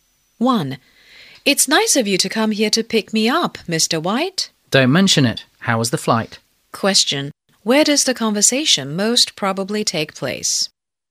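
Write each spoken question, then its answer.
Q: Where does the conversation most probably take place?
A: At the airport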